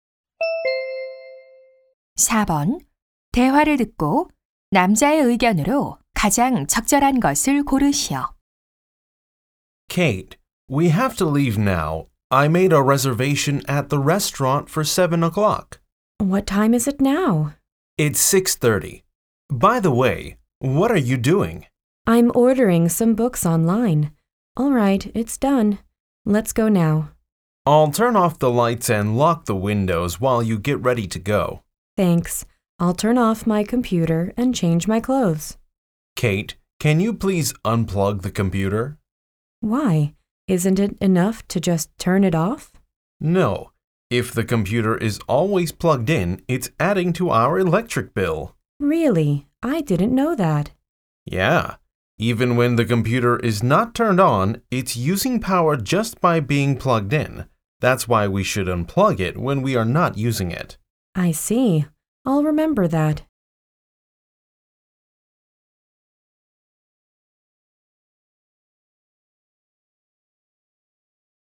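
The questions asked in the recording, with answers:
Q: 대화를 듣고 남자의 의견으로 가장 적절한 것을 고르시오.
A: 컴퓨터를 사용하지 않을 때는 플러그를 뽑아야 한다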